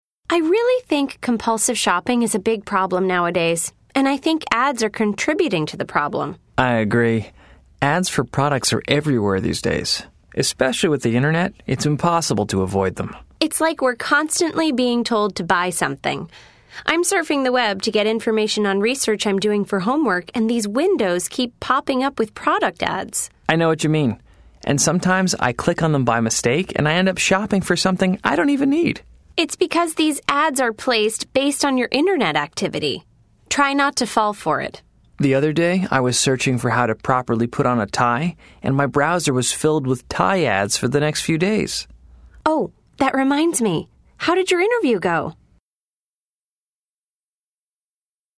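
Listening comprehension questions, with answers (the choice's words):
Listen to the conversation. Then choose the correct answers.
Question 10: What is the main idea of the conversation?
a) The two people are discussing the ways they use the Internet to shop.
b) The two people are talking about how ads contribute to an addiction.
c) The two people are talking about how to improve the Internet.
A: The two people are talking about how ads contribute to an addiction.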